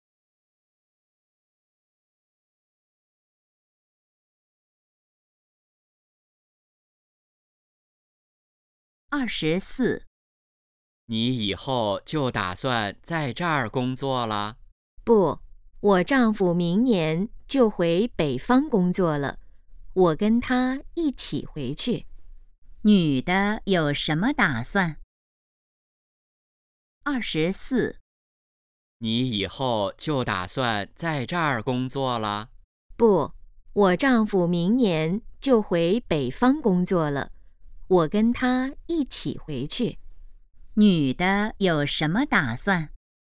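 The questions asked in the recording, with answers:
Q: 女的有什么打算?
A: 明年跟丈夫回北方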